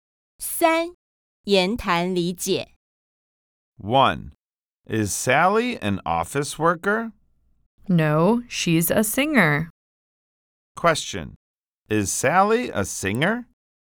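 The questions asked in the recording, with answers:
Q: Is Sally a singer?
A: Yes, she is.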